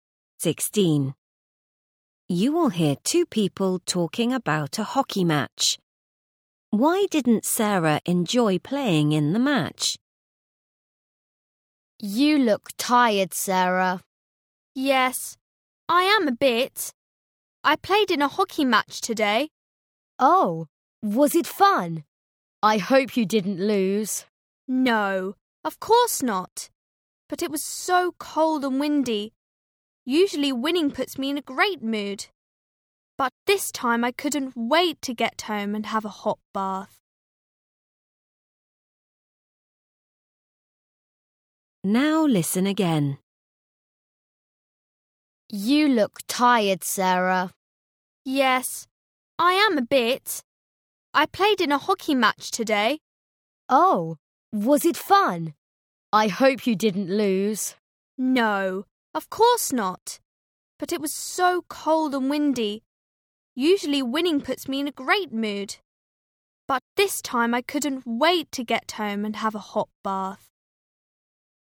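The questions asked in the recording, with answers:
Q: Why didn't Sarah enjoy playing in the match?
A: Because it was so cold and windy.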